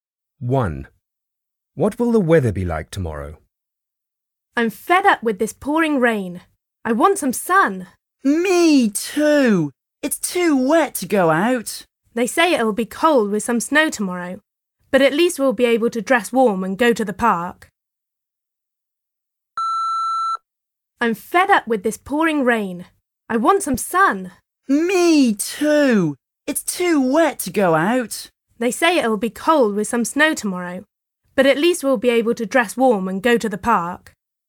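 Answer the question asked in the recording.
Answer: cold with some snow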